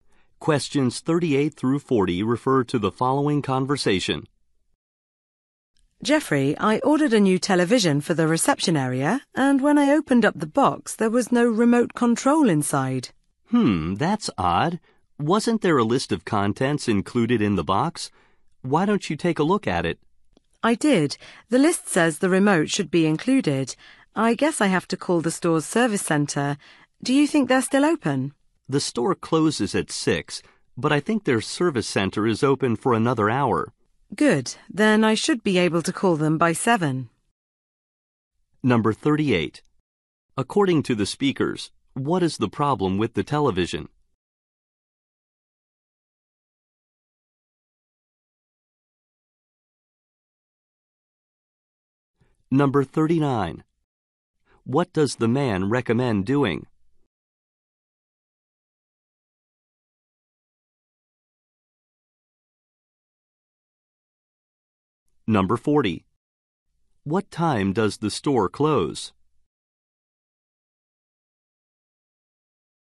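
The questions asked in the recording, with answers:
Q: According to the speakers, what is the problem with the television?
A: The remote control is missing

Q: What does the man recommend doing?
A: Checking the list of contents

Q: What time does the store close?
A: At 6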